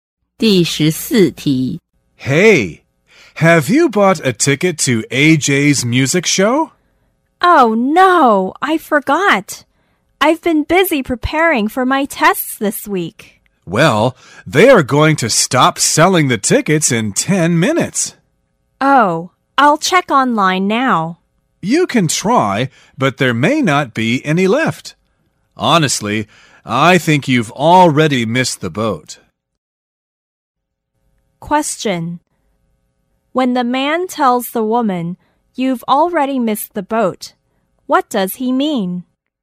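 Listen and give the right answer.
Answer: It's too late to get a ticket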